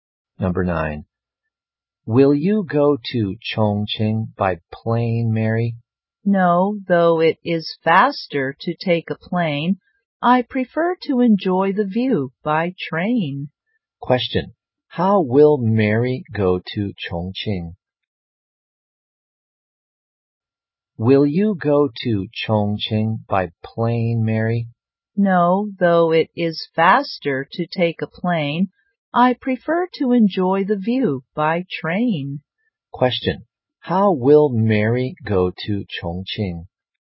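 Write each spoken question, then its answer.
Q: How will Mary go to Chongqing?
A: By train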